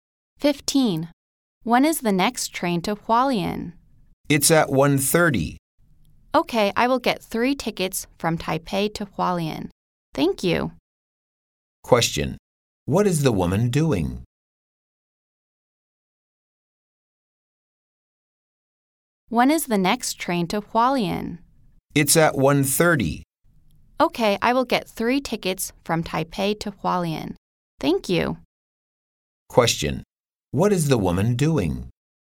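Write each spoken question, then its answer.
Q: What is the woman doing?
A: Buying train tickets to Hualien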